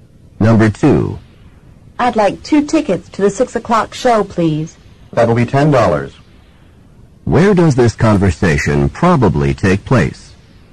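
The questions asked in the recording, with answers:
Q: Where does this conversation probably take place?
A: At a theater or cinema box office.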